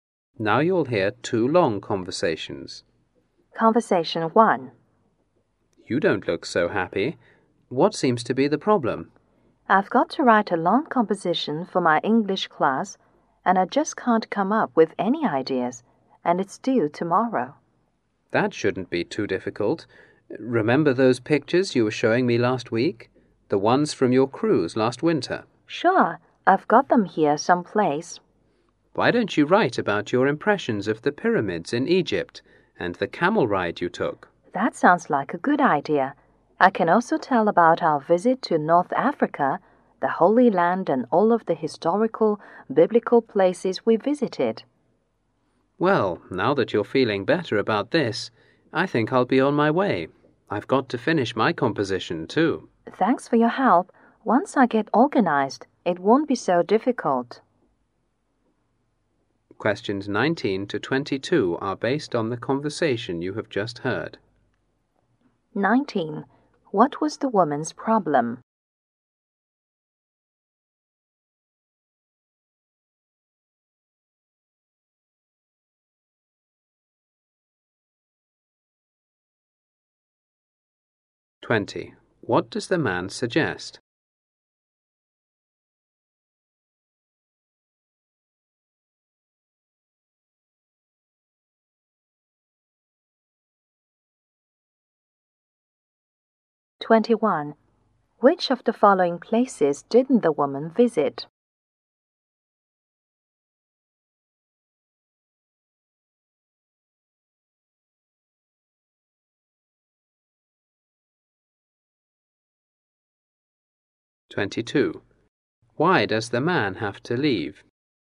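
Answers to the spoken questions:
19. She couldn't think of ideas for a long English composition due tomorrow.
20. Write about her cruise, the pyramids and the camel ride.
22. He has to finish his own composition.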